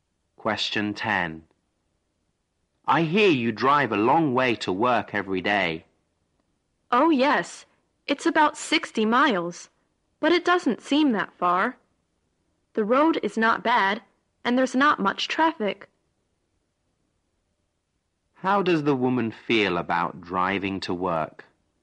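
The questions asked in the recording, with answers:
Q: How does the woman feel about driving to work?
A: It doesn't bother her, because the road is good and there's not much traffic.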